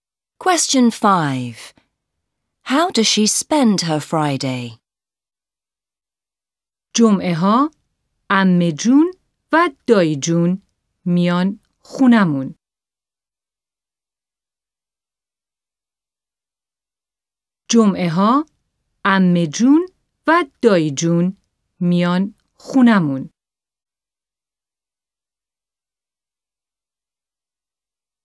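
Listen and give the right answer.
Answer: Her aunt and uncle come to her house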